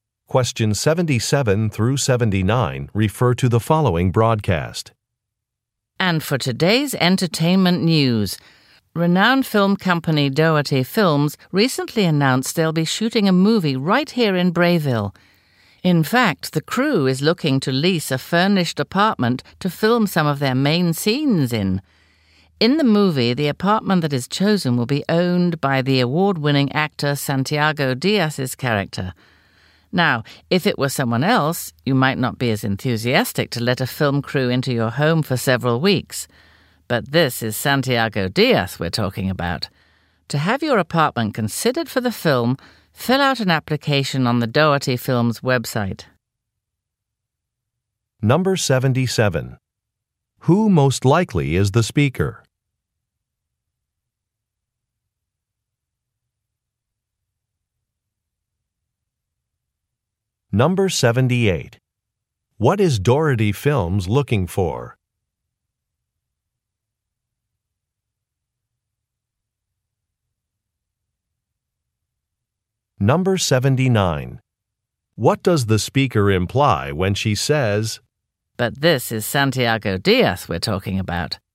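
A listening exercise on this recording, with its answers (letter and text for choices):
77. Who most likely is the speaker?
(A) A news reporter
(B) A movie director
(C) A real estate agent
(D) A town official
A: (A) A news reporter

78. What is Dougherty Films looking for?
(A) Movie title suggestions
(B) Additional funding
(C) A lead actor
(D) A filming location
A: (D) A filming location

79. What does the speaker imply when she says, "But this is Santiago Diaz we're talking about"?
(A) She has never heard of Santiago Diaz.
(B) She had previously mentioned the wrong name.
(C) Santiago Diaz is very famous.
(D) Santiago Diaz will be interviewed next.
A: (C) Santiago Diaz is very famous.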